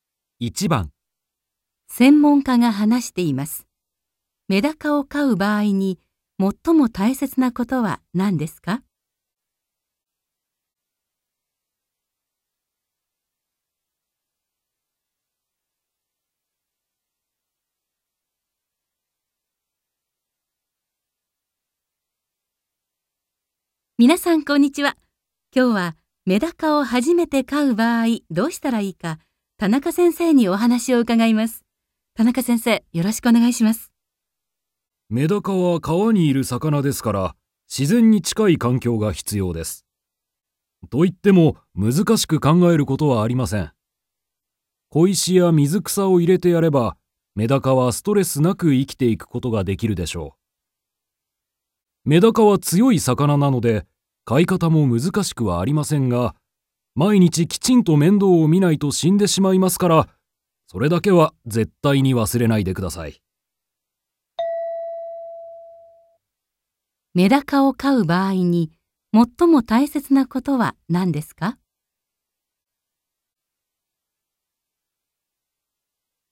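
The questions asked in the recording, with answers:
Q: メダカを飼う場合に、最も大切なことは何ですか?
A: 毎日きちんと面倒を見ること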